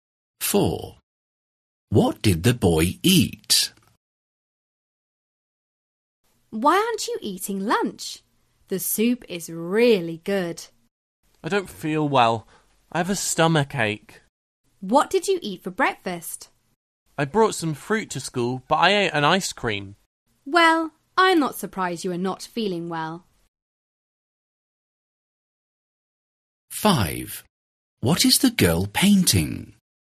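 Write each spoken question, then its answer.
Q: What did the boy eat?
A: An ice cream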